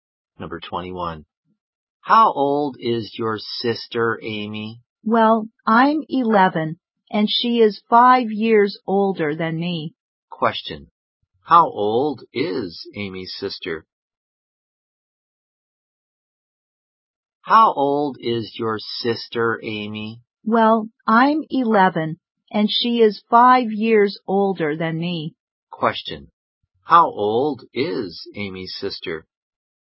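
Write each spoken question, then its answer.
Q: How old is Amy's sister?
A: 16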